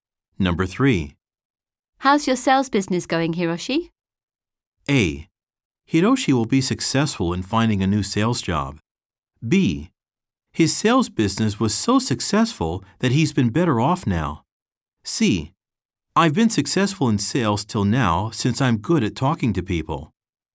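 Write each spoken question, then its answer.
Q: How's your sales business going, Hiroshi?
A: C: I've been successful in sales till now since I'm good at talking to people.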